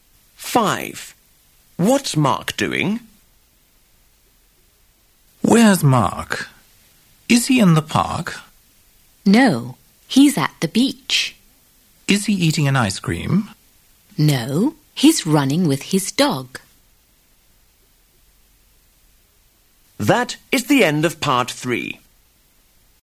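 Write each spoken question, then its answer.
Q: What's Mark doing?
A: Running with his dog at the beach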